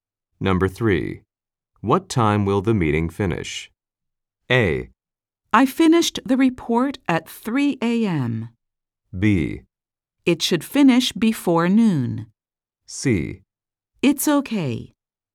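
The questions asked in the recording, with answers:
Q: What time will the meeting finish?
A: B: It should finish before noon.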